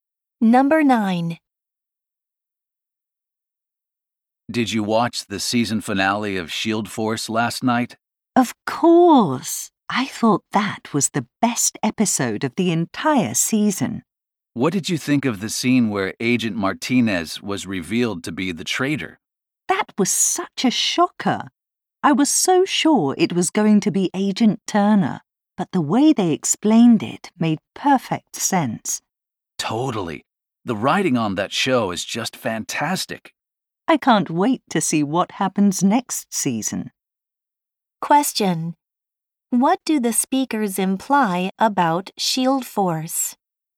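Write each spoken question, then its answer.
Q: What do the speakers imply about Shield Force?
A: The show is well written, with a surprising but logical plot twist.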